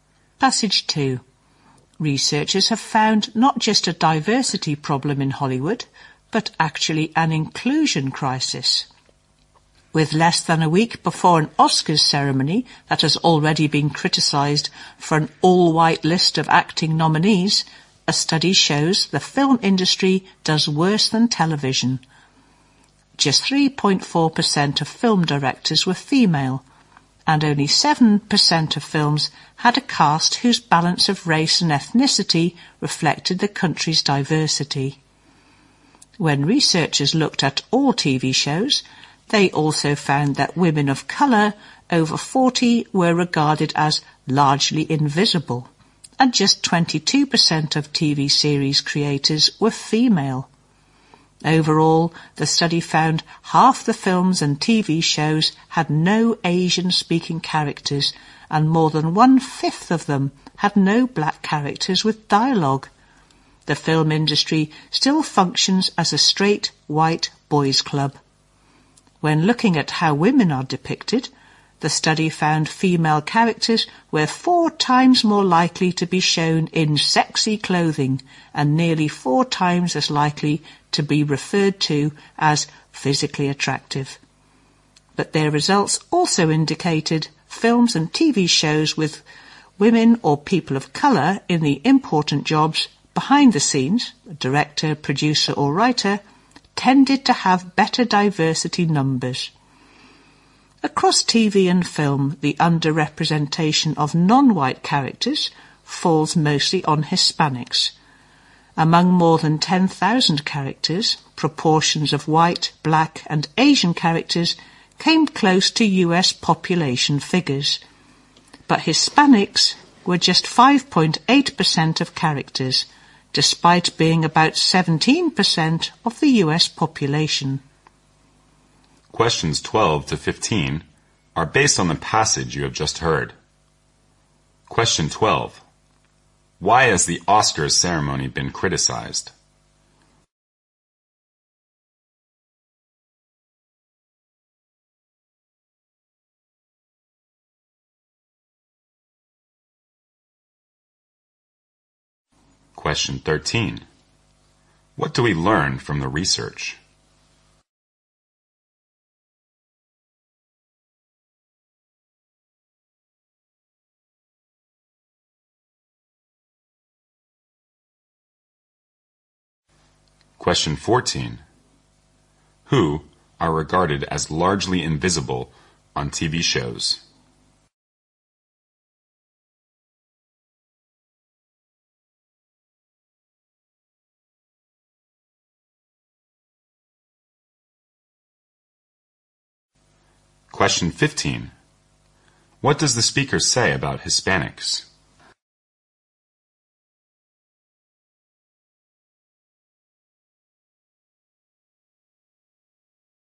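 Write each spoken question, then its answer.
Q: Why has the Oscars ceremony been criticized?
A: All of its acting nominees are white.

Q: Who are regarded as largely invisible on TV shows?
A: Women of colour over 40.

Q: What does the speaker say about Hispanics?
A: They are greatly underrepresented: just 5.8% of characters, though about 17% of the US population.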